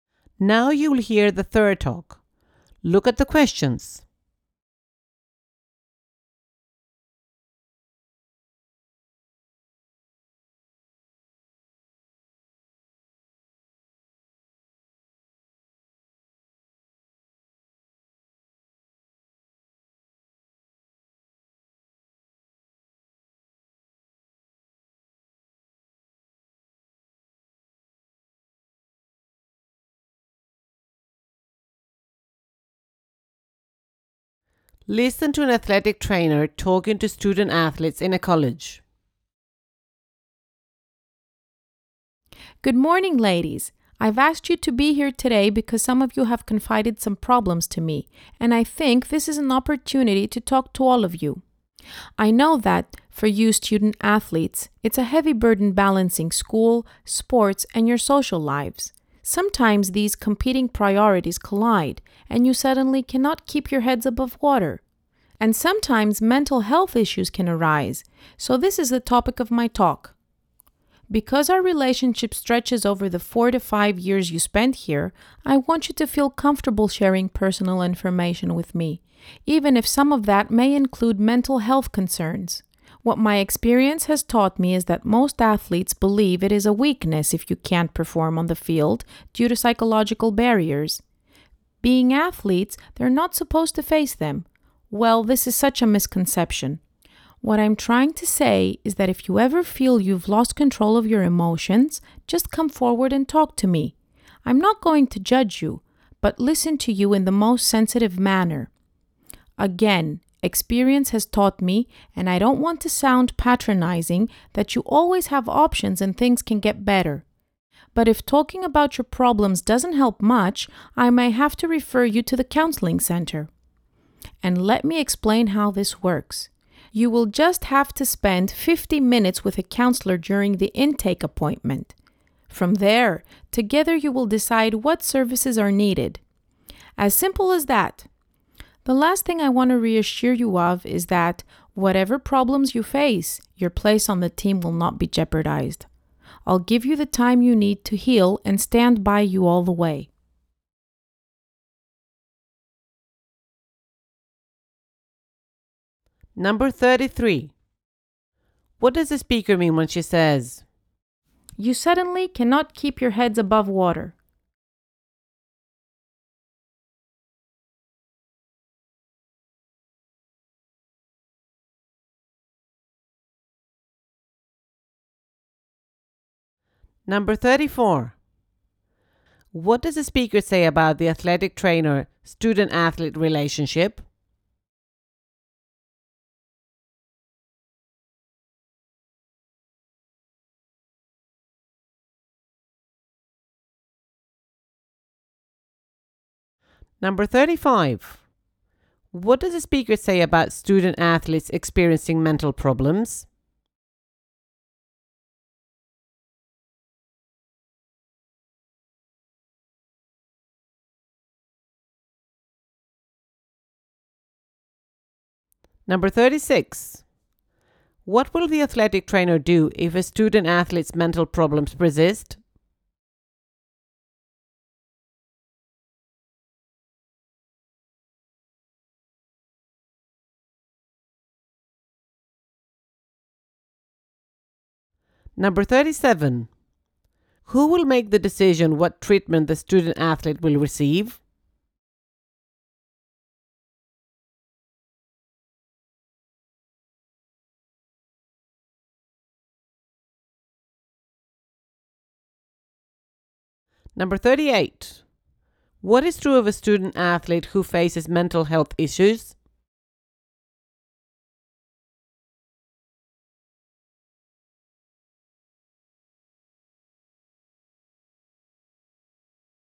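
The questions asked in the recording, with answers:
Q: "You suddenly cannot keep your heads above water"?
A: You suddenly feel overwhelmed and can't cope

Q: What will the athletic trainer do if a student athlete's mental problems persist?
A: Refer them to the counseling center

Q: Who will make the decision what treatment the student athlete will receive?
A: The student athlete and the counselor together

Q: What is true of a student athlete who faces mental health issues?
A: Their place on the team will not be put at risk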